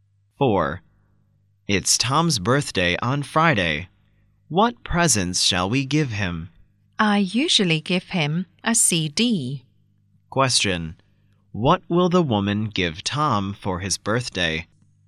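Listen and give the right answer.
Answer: A CD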